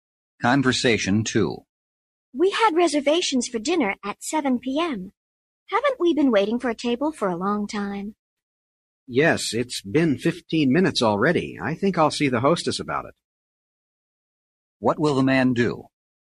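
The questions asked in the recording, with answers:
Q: What will the man do?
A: See the hostess about the table.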